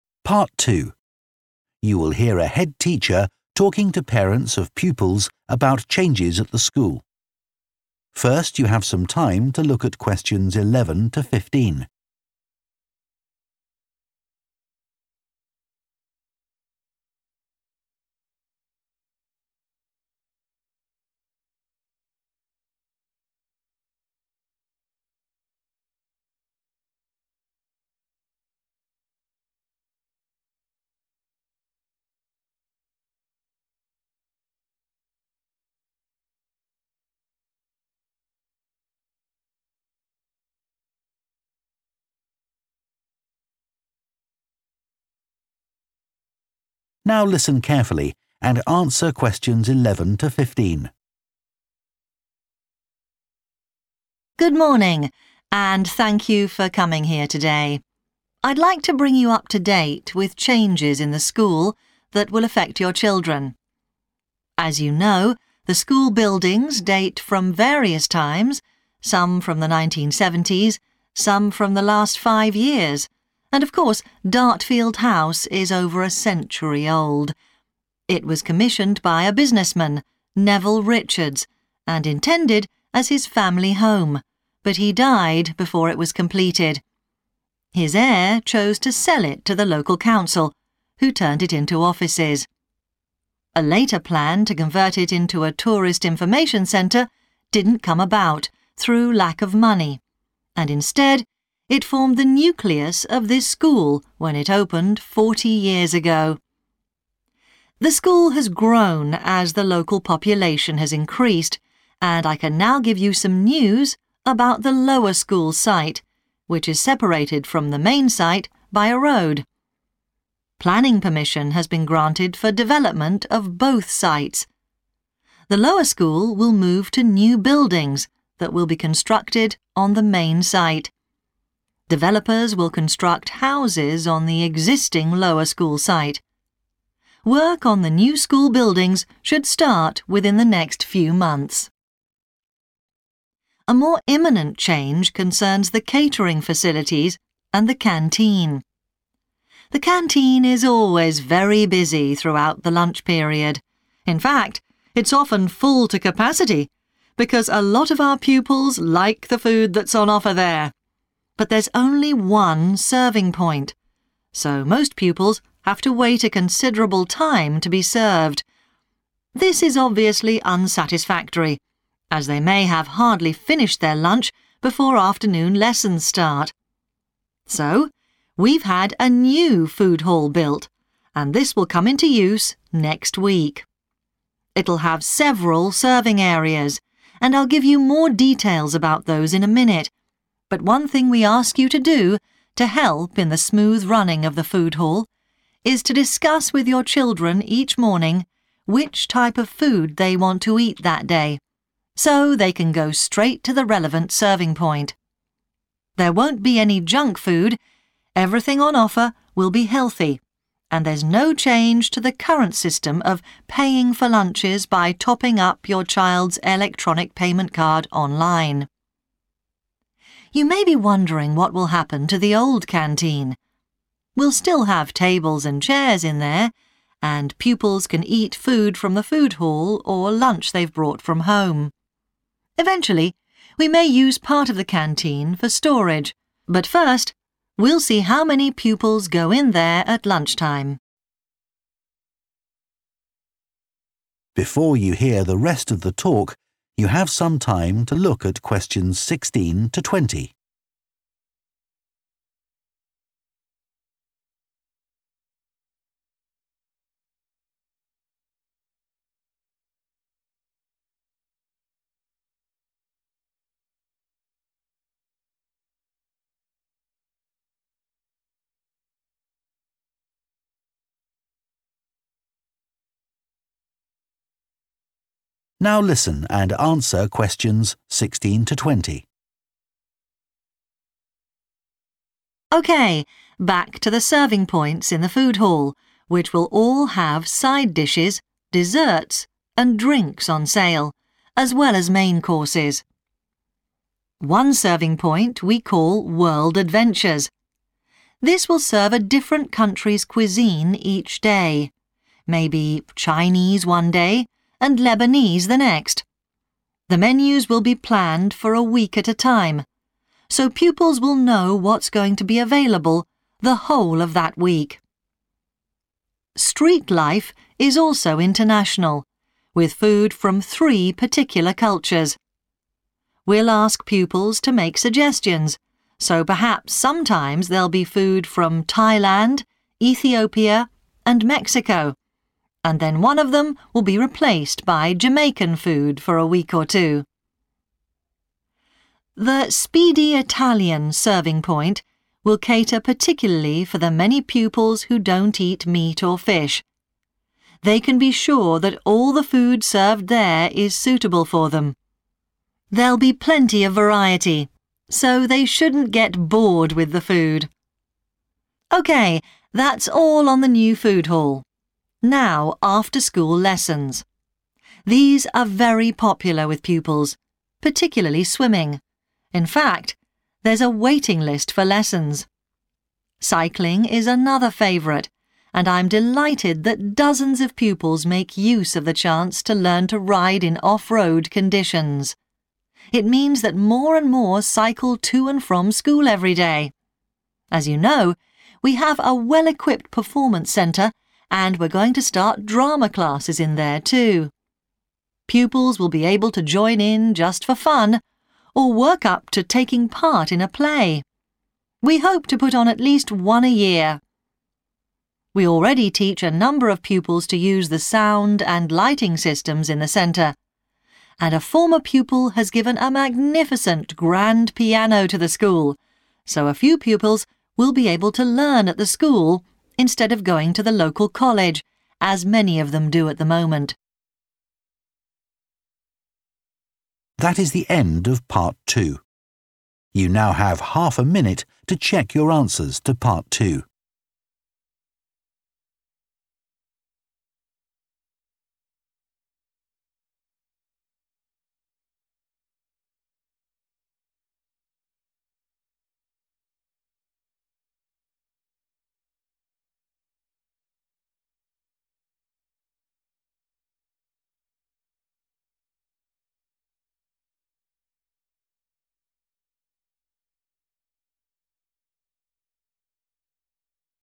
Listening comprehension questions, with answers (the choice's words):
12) What is planned with regard to the lower school?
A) All buildings on the main site will be improved.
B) The lower school site will be used for new homes.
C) Additional school buildings will be constructed on the lower school site.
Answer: The lower school site will be used for new homes.

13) The catering has been changed because of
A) long queuing times.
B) changes to the school timetable.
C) dissatisfaction with the menus.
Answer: long queuing times.

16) World Adventures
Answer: D. daily change in menu

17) Street Life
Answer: A. pupils help to plan menus

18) Speedy Italian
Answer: B. only vegetarian food

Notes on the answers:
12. Các nhà phát triển sẽ xây dựng các ngôi nhà trên địa điểm trường trung học hiện có = Điểm trường thấp hơn sẽ được sử dụng như những ngôi nhà mới. ⇒ đáp án B
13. chờ một thời gian đáng kể để được phục vụ = xếp 1 hàng dài ⇒ đáp án A
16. Nơi này sẽ phục vụ các món ăn của một quốc gia khác nhau mỗi ngày ⇒ đáp án D
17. Chúng tôi sẽ yêu cầu học sinh đưa ra đề xuất món ăn = học sinh giúp lên menu ⇒ đáp án A